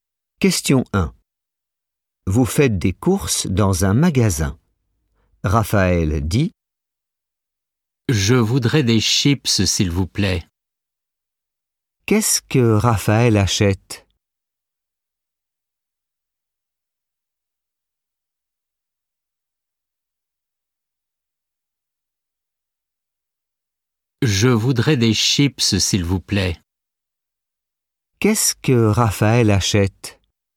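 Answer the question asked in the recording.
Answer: des chips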